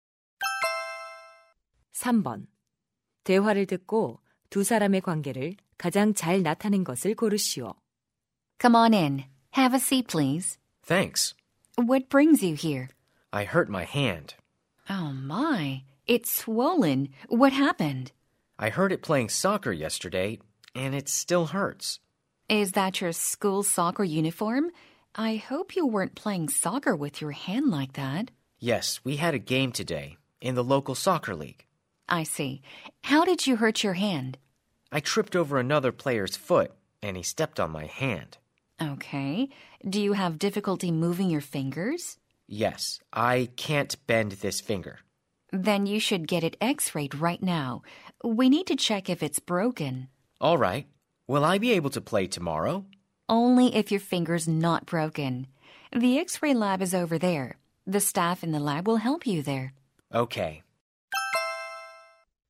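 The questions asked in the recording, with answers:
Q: 대화를 듣고 두 사람의 관계를 가장 잘 나타낸 것을 고르시오.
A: 의사 - 환자(축구 선수)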